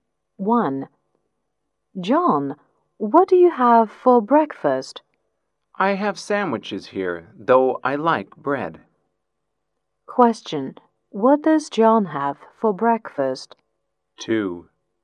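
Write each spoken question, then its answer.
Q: Question, what does John have for breakfast?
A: Sandwiches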